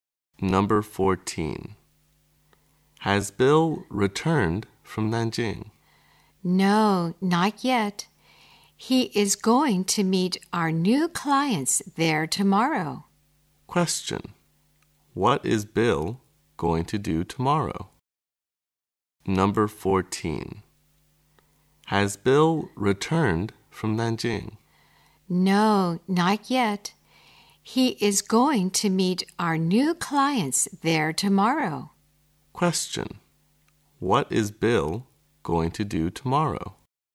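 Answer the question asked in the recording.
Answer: Meet new clients in Nanjing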